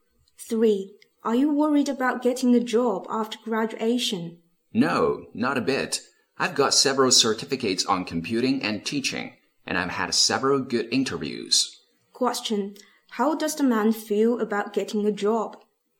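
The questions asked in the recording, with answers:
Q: How does the man feel about getting a job?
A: Confident.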